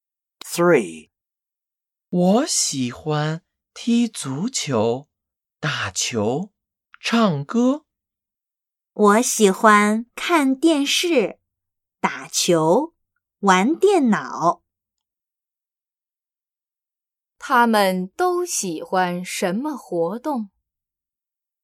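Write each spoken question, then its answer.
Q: 他们都喜欢什么活动?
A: 打球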